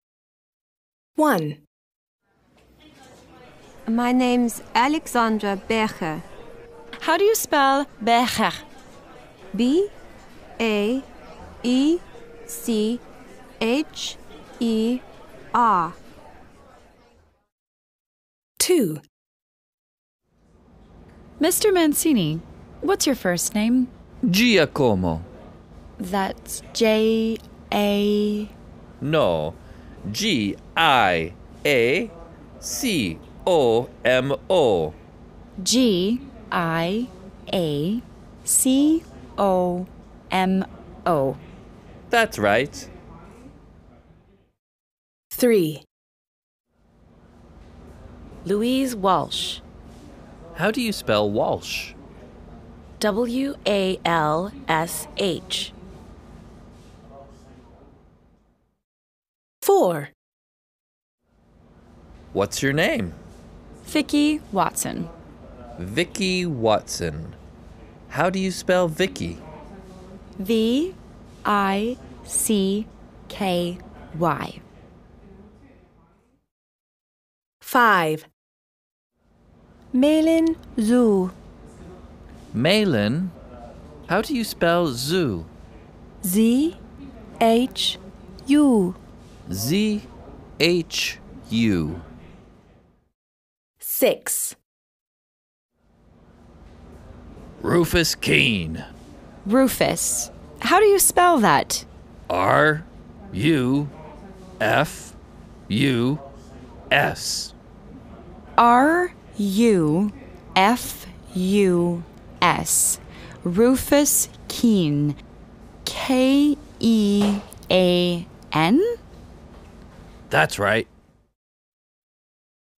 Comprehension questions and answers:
A. Listen and complete the names.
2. Mancini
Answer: Giacomo

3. Louise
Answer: Walsh

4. Watson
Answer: Vicky

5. Meilin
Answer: Zhu

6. Kean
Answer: Rufus